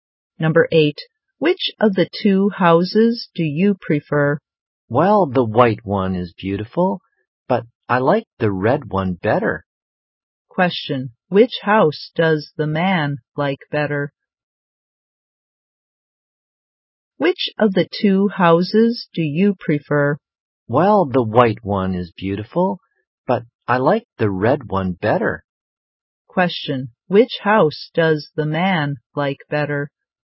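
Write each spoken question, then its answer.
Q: which house does the man like better?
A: The red one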